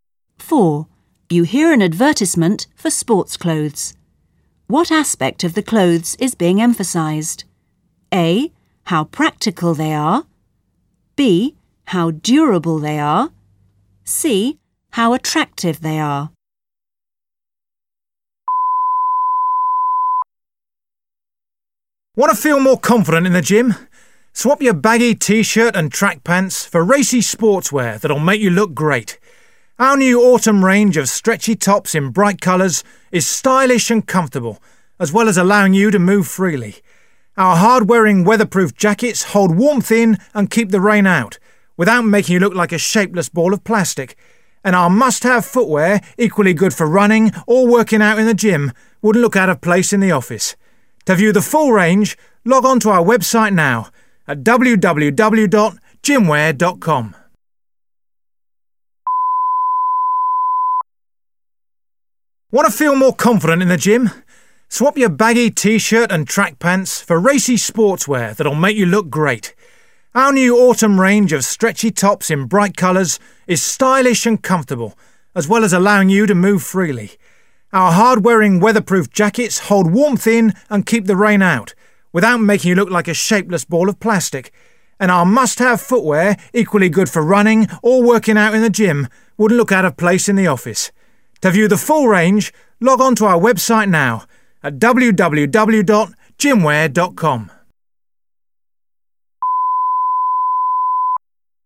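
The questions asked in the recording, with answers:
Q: What aspect of the clothes is being emphasised?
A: C: how attractive they are.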